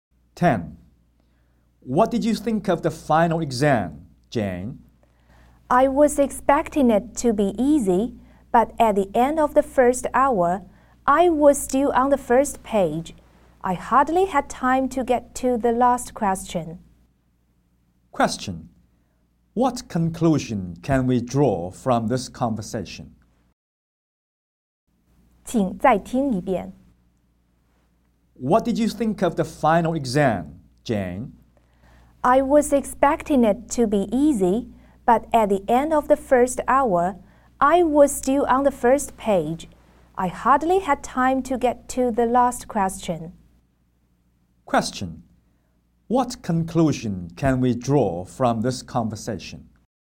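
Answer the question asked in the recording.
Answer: The exam was harder than Jane expected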